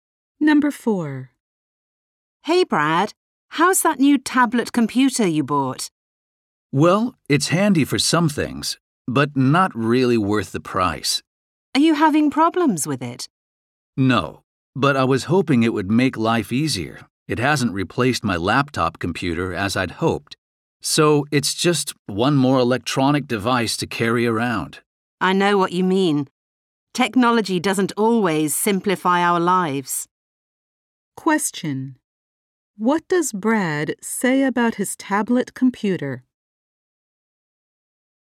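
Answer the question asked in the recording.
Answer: It isn't really worth the price; it hasn't replaced his laptop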